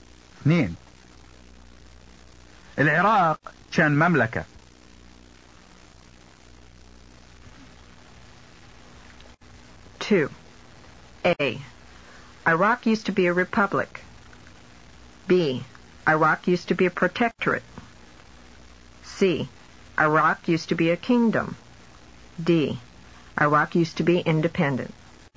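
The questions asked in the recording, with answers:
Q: العراق كان مملكة.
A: C: Iraq used to be a kingdom.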